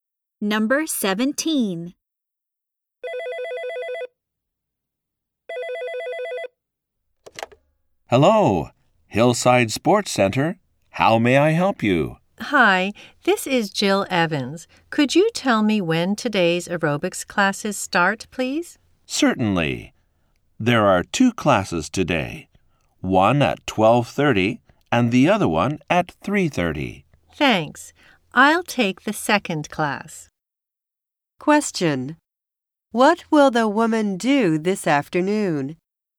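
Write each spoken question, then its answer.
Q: What will the woman do this afternoon?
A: Take the 3:30 aerobics class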